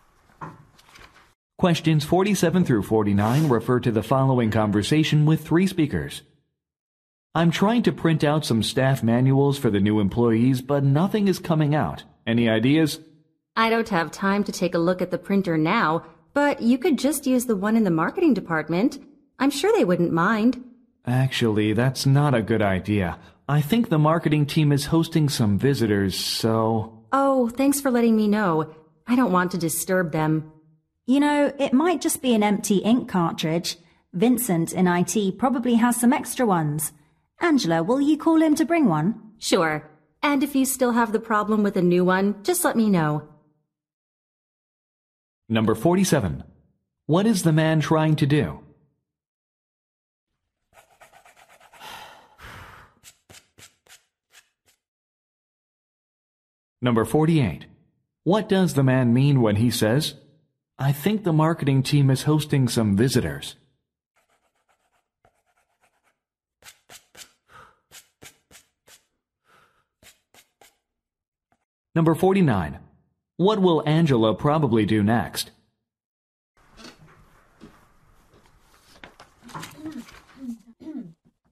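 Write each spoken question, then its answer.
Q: What is the man trying to do?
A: Print staff manuals for new employees

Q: What does the man mean when he says, I think the marketing team is hosting some visitors?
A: The marketing printer shouldn't be used now

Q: What will Angela probably do next?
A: Call Vincent in IT to bring an ink cartridge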